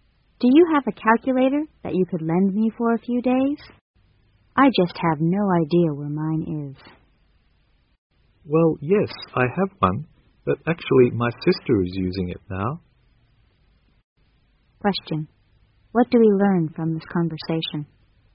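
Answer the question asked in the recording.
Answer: The woman can't lend her calculator now because her sister is using it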